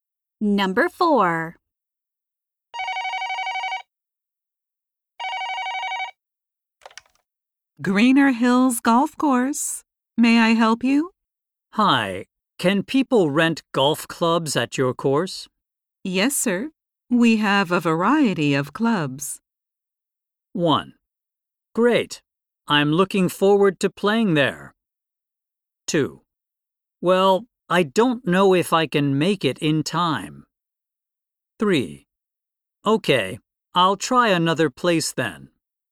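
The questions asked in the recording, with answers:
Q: Yes, sir. We have a variety of clubs.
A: 1: Great. I'm looking forward to playing there.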